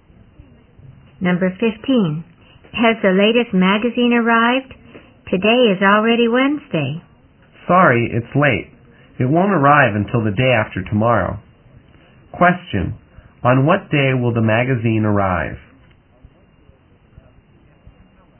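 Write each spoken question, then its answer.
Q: Question, on what day will the magazine arrive?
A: Friday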